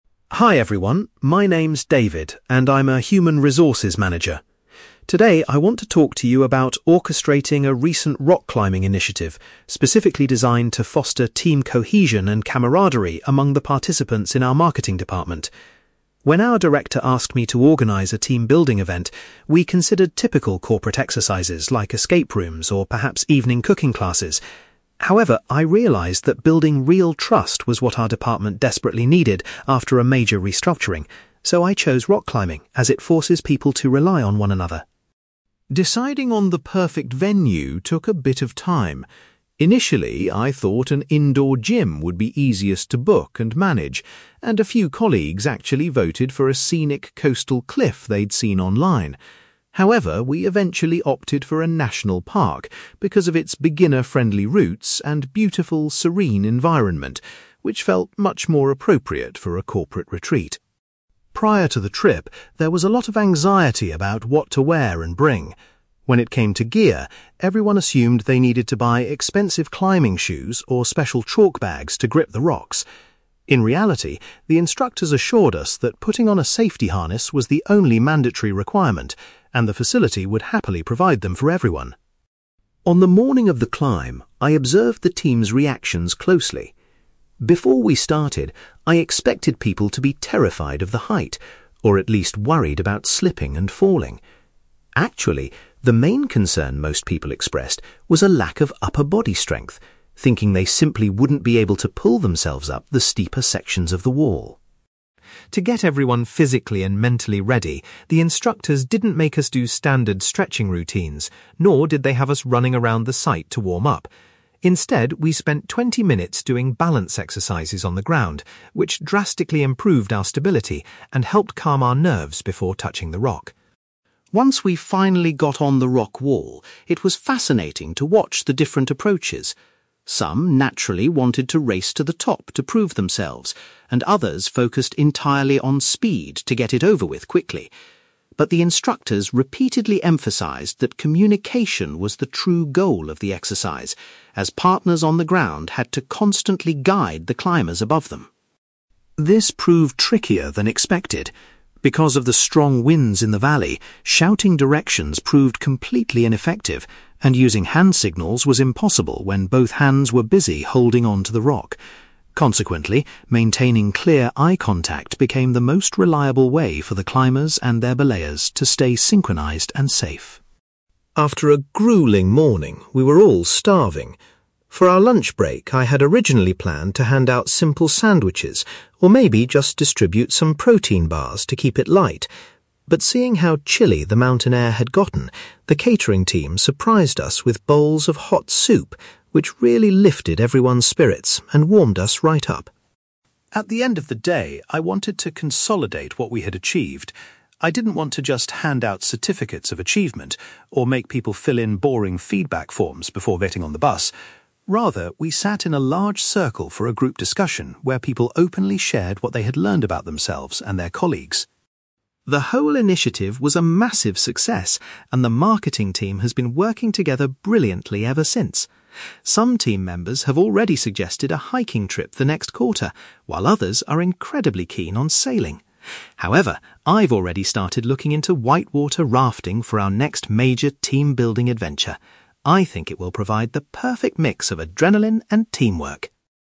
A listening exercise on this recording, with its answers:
You will hear a man called David giving a presentation about a rock-climbing initiative he organized for his colleagues. For questions 9-18, complete the sentences with a word or short phrase.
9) David selected rock climbing because he felt his department lacked (9)........................... .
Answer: trust

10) The group ultimately went to a (10)........................... since the climbing paths there were suitable for novices.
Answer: national park

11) David's colleagues were relieved to learn that wearing a (11)........................... was the only essential equipment needed.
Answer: safety harness

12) David noticed that a perceived lack of (12)........................... was the primary worry among his colleagues before the activity.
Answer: upper body strength

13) The instructors had the group complete some (13)........................... prior to starting the actual climb.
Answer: balance exercises

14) During the ascent, the instructors reminded everyone that (14)........................... was the primary objective.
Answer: communication

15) David explains that making (15)........................... was the best method for partners to stay coordinated on the rock face.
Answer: eye contact

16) The participants were very grateful to be served (16)........................... when the weather turned cold during their break.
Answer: hot soup

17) David chose to organize a (17)........................... at the end of the event instead of giving out documents.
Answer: group discussion

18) For the next corporate excursion, David is currently researching (18)........................... .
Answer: white-water rafting

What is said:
David: Hi everyone, my name is David, and I'm a human resources manager. Today, I want to talk to you about orchestrating a recent rock-climbing initiative specifically designed to foster team cohesion and camaraderie among the participants in our marketing department. When our director asked me to organize a team-building event, we considered typical corporate exercises like escape rooms or perhaps evening cooking classes. However, I realised that building real trust was what our department desperately needed after a major restructuring, so I chose rock climbing as it forces people to rely on one another.
Deciding on the perfect venue took a bit of time. Initially, I thought an indoor gym would be easiest to book and manage, and a few colleagues actually voted for a scenic coastal cliff they'd seen online. However, we eventually opted for a national park because of its beginner-friendly routes and beautiful, serene environment, which felt much more appropriate for a corporate retreat.
Prior to the trip, there was a lot of anxiety about what to wear and bring. When it came to gear, everyone assumed they needed to buy expensive climbing shoes or special chalk bags to grip the rocks. In reality, the instructors assured us that putting on a safety harness was the only mandatory requirement, and the facility would happily provide them for everyone.
On the morning of the climb, I observed the team's reactions closely. Before we started, I expected people to be terrified of the height, or at least worried about slipping and falling. Actually, the main concern most people expressed was a lack of upper body strength, thinking they simply wouldn't be able to pull themselves up the steeper sections of the wall.
To get everyone physically and mentally ready, the instructors didn't make us do standard stretching routines, nor did they have us running around the site to warm up. Instead, we spent twenty minutes doing balance exercises on the ground, which drastically improved our stability and helped calm our nerves before touching the rock.
Once we finally got on the rock wall, it was fascinating to watch the different approaches. Some naturally wanted to race to the top to prove themselves, and others focused entirely on speed to get it over with quickly! But the instructors repeatedly emphasized that communication was the true goal of the exercise, as partners on the ground had to constantly guide the climbers above them.
This proved trickier than expected. Because of the strong winds in the valley, shouting directions proved completely ineffective, and using hand signals was impossible when both hands were busy holding onto the rock. Consequently, maintaining clear eye contact became the most reliable way for the climbers and their belayers to stay synchronized and safe.
After a grueling morning, we were all starving. For our lunch break, I had originally planned to hand out simple sandwiches, or maybe just distribute some protein bars to keep it light. But seeing how chilly the mountain air had gotten, the catering team surprised us with bowls of hot soup, which really lifted everyone's spirits and warmed us right up.
At the end of the day, I wanted to consolidate what we had achieved. I didn't want to just hand out certificates of achievement, or make people fill in boring feedback forms before getting on the bus. Rather, we sat in a large circle for a group discussion where people openly shared what they had learned about themselves and their colleagues.
The whole initiative was a massive success and the marketing team has been working together brilliantly ever since. Some team members have already suggested a hiking trip for next quarter, while others are incredibly keen on sailing. However, I've already started looking into white-water rafting for our next major team-building adventure. I think it will provide the perfect mix of adrenaline and teamwork!

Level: B2